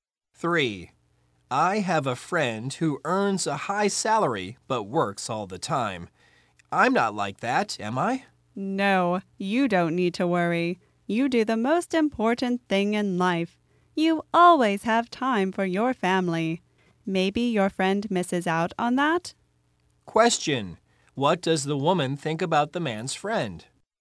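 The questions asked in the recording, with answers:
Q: what does the woman think about the man's friend?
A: He may miss out on time with his family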